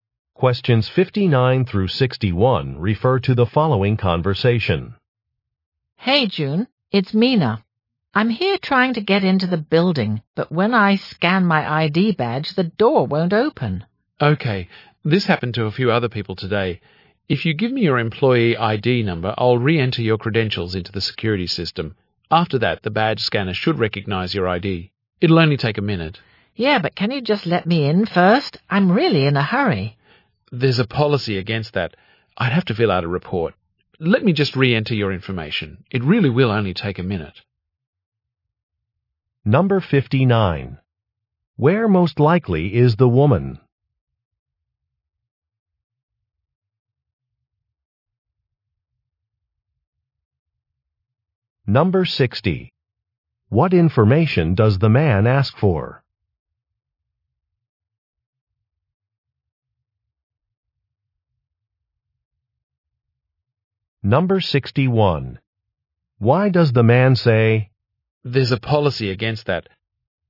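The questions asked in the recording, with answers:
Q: Where most likely is the woman?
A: Outside the building entrance

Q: What information does the man ask for?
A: Her employee ID number

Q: Why does the man say,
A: He cannot let her in without her badge working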